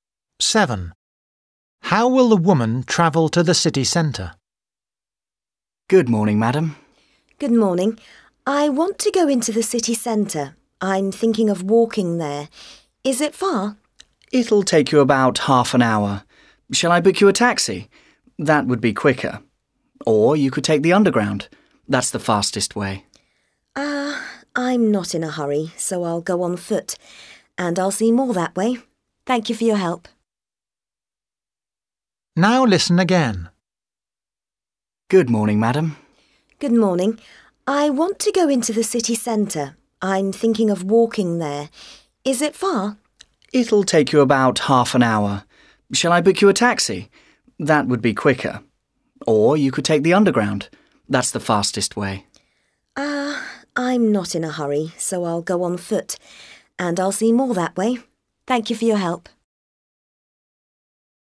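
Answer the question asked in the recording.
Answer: on foot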